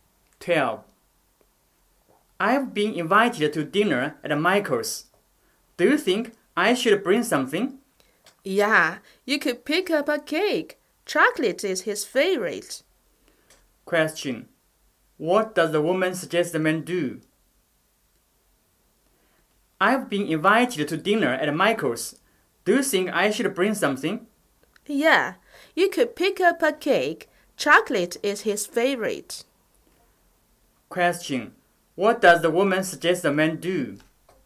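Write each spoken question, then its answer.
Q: What does the woman suggest the man do?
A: Buy a chocolate cake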